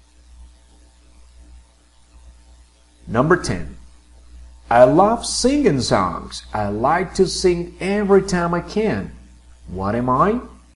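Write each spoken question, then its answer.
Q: What am I?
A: a singer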